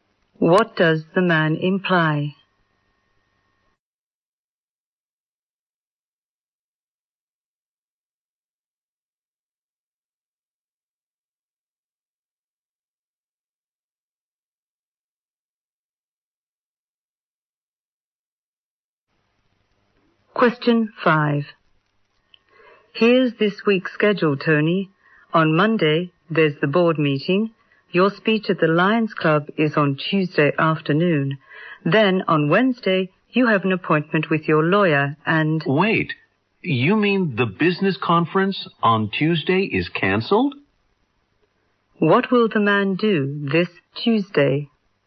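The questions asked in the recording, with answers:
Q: What will the man do this Tuesday?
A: Give a speech at the Lions Club.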